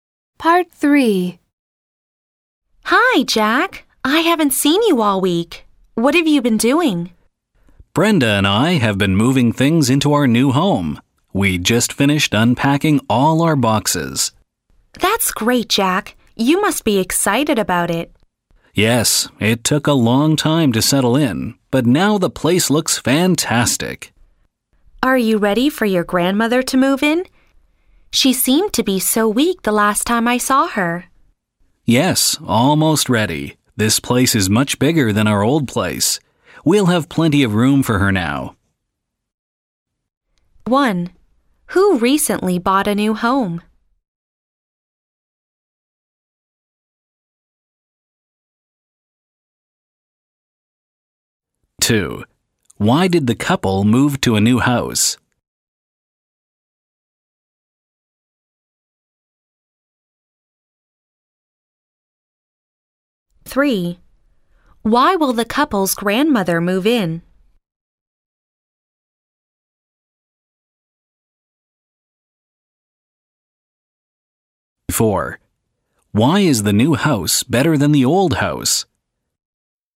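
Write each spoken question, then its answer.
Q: Who recently bought a new home?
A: Jack and Brenda

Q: Why will the couple's grandmother move in?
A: She seemed very weak.

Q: Why is the new house better than the old house?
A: It is much bigger.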